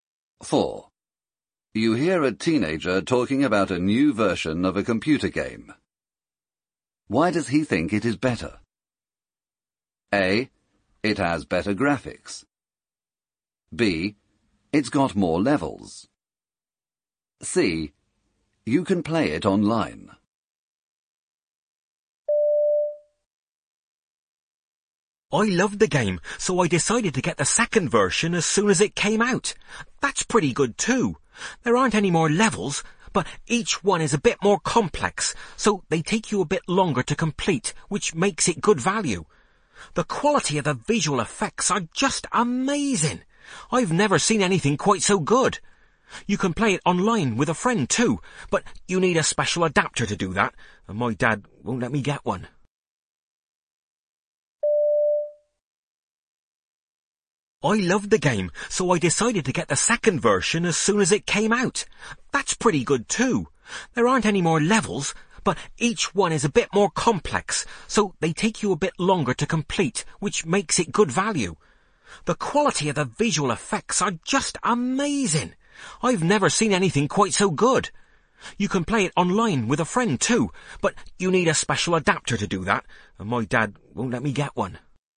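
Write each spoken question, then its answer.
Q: Why does he think it is better?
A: A: It has better graphics.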